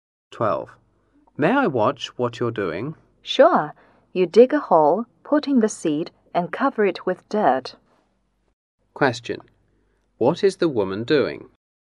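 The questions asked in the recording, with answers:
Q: What is the woman doing?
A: Planting seeds.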